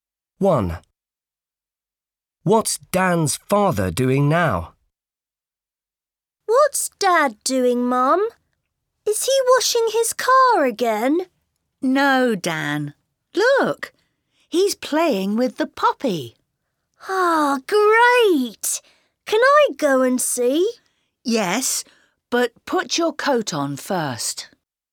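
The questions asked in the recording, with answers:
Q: What's Dan's father doing now?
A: playing with the puppy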